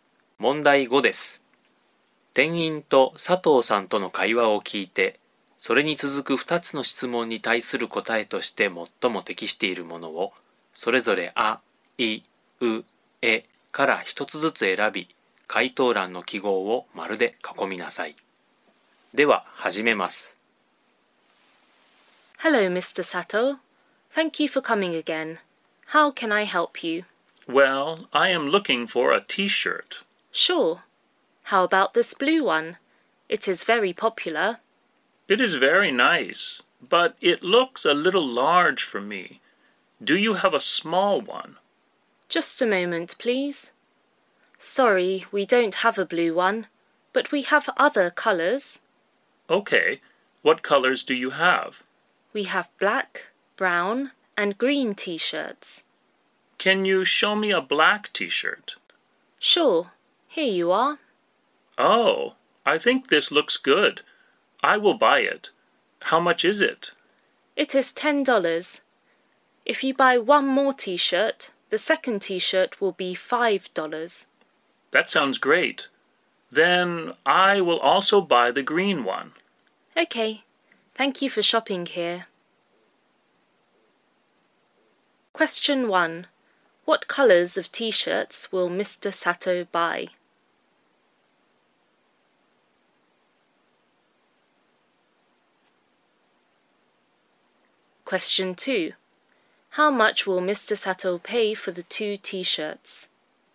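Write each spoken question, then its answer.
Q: What colors of t-shirts will Mr. Sato buy?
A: Black and green

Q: How much will Mr. Sato pay for the 2 t-shirts?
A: $15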